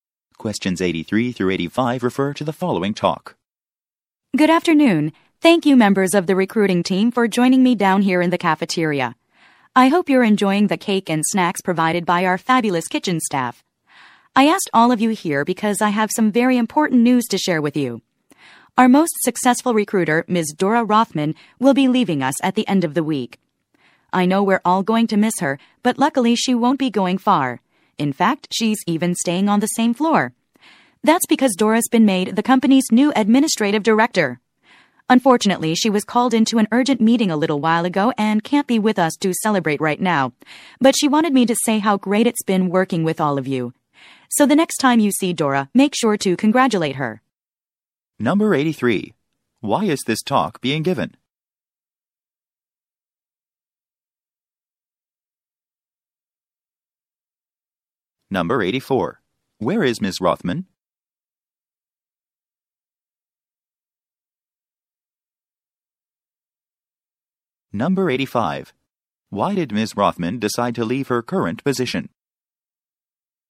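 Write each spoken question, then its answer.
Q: Why is this talk being given?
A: To announce that Dora Rothman is leaving the recruiting team for a new position

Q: Where is Ms. Rothman?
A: In an urgent meeting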